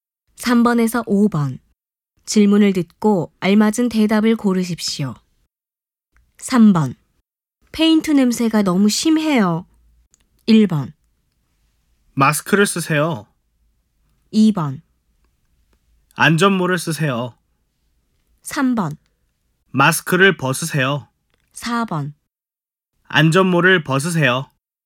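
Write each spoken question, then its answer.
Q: 페인트 냄새가 너무 심해요.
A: 1: 마스크를 쓰세요.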